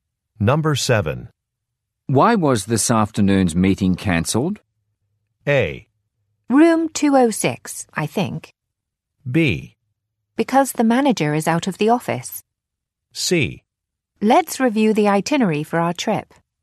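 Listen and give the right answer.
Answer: B: Because the manager is out of the office.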